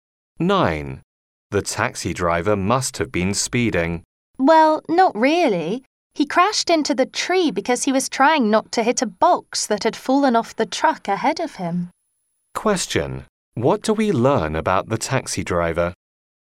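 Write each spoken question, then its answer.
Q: What do we learn about the taxi driver?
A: He wasn't speeding; he crashed trying to avoid a box that fell off a truck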